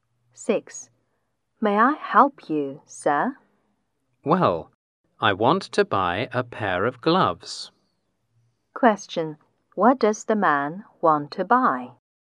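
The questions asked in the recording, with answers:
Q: What does the man want to buy?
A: A pair of gloves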